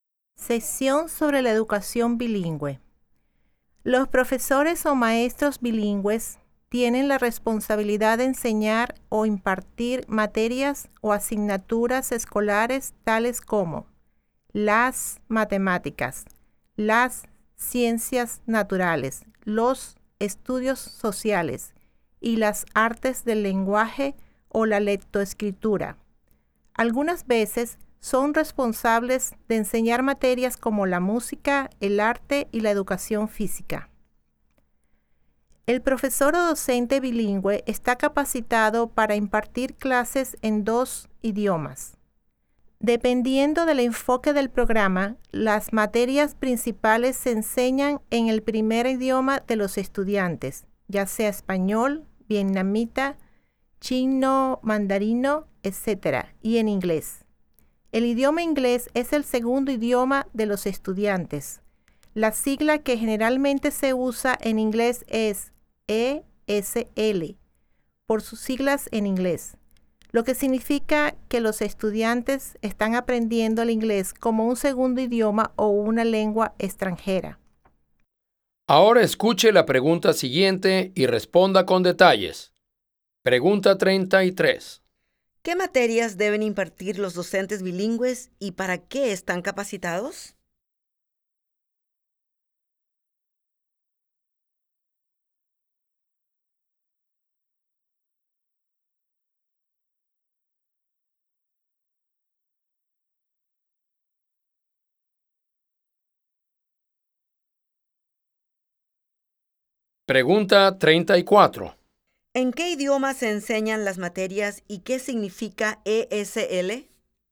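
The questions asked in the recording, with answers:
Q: ¿Qué materias deben impartir los docentes bilingües y para qué están capacitados?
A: Matemáticas, ciencias naturales, estudios sociales y artes del lenguaje o lectoescritura (a veces música, arte y educación física); están capacitados para impartir clases en dos idiomas.

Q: ¿En qué idioma se enseñan las materias y qué significa ESL?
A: En el primer idioma de los estudiantes (español, vietnamita, chino, etc.) y en inglés; ESL significa que aprenden inglés como segundo idioma o lengua extranjera.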